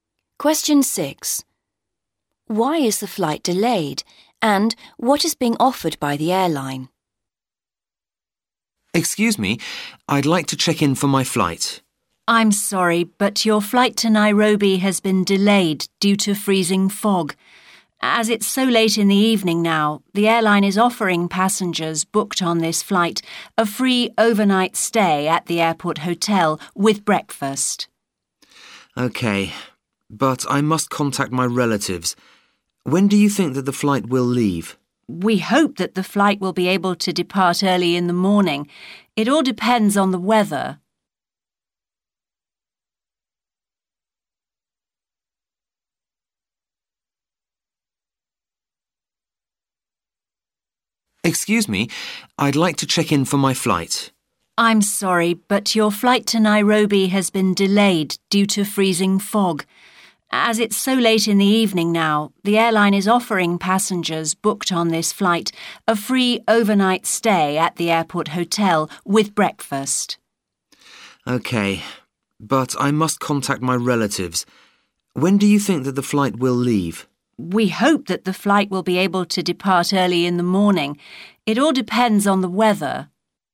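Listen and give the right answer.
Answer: Freezing fog; a free overnight stay at the airport hotel with breakfast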